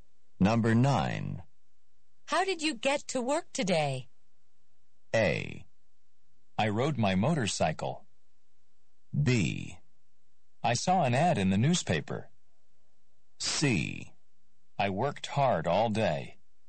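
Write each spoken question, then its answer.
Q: How did you get to work today?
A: A: I rode my motorcycle.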